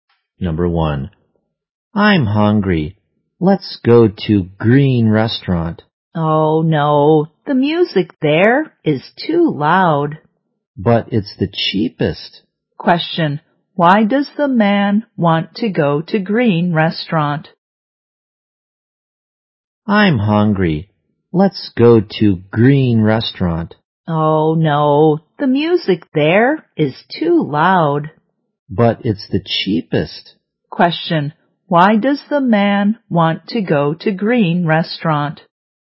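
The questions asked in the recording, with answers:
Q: why does the man want to go to Green Restaurant?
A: Because it's the cheapest.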